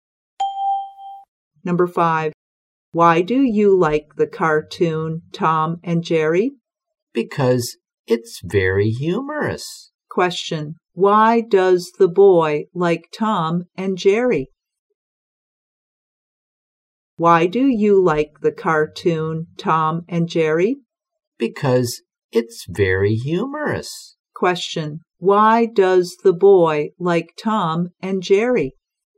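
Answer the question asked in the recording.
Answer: Because it's very humorous.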